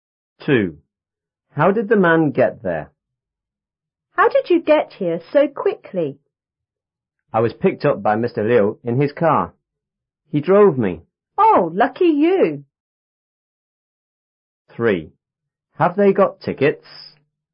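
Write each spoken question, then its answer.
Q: How did the man get there?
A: Mr. Liu drove him in his car.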